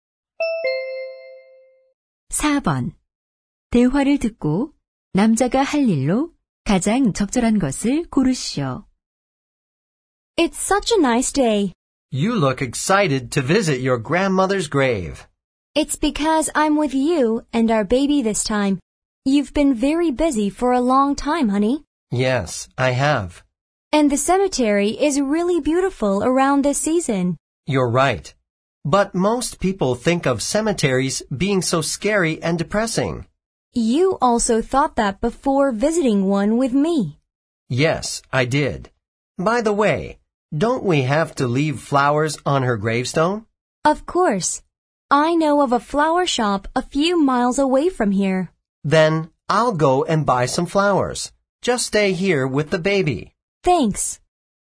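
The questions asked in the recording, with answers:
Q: 대화를 듣고 남자가 할 일로 가장 적절한 것을 고르시오.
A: 꽃 사러 가기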